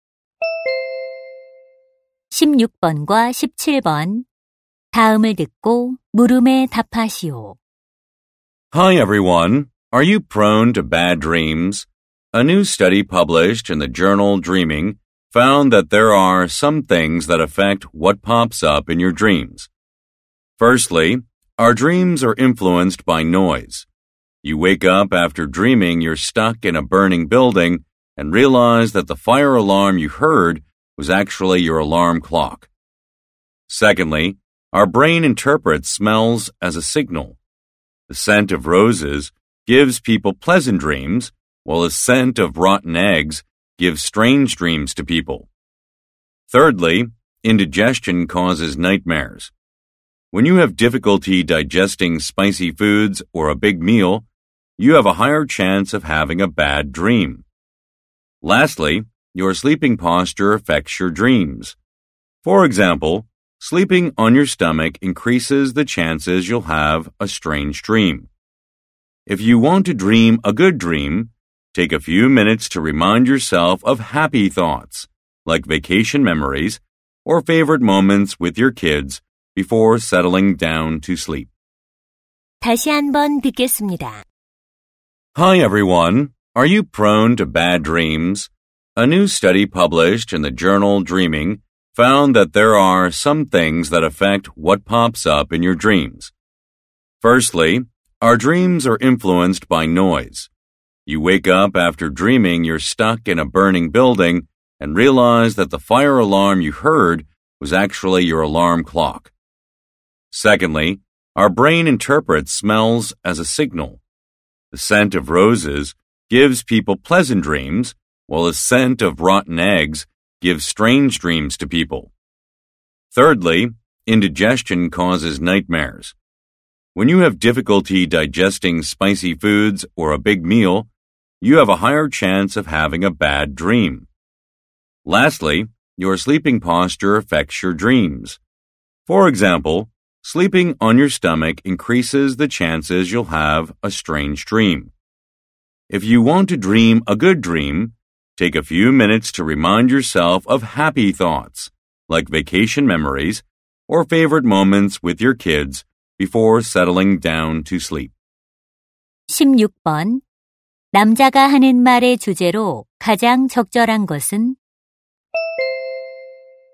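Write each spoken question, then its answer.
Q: 남자가 하는 말의 주제로 가장 적절한 것은?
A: 꿈에 영향을 미치는 요인들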